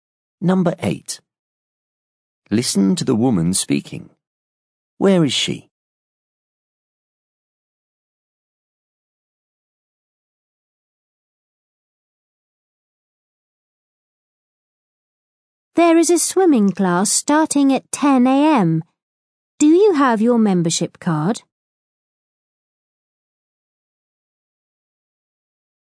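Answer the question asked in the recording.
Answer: At a swimming pool / sports centre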